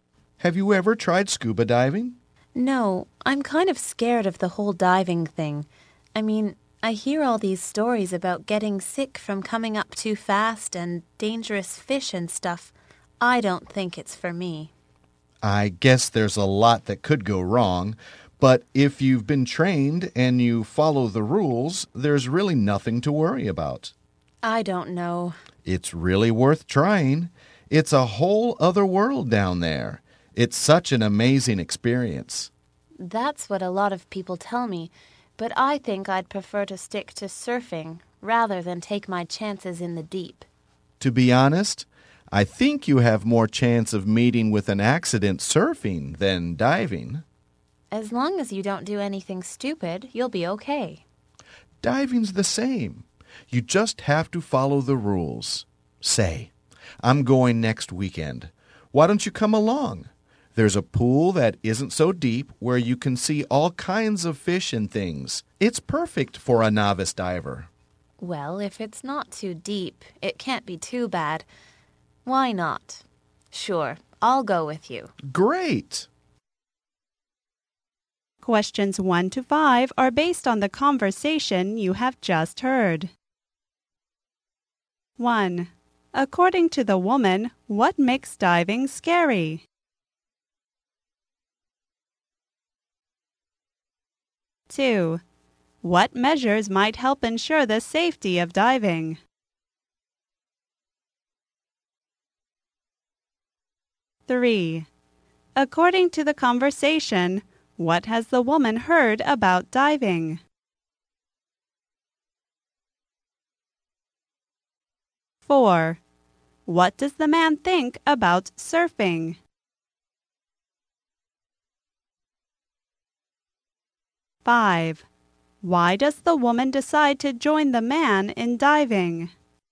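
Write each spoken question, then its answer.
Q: According to the woman, what makes diving scary?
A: Getting sick from coming up too fast and dangerous fish

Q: What measures might help ensure the safety of diving?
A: Being trained and following the rules

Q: What does the man think about surfing?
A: It has more chance of accidents than diving

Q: Why does the woman decide to join the man in diving?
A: The pool isn't too deep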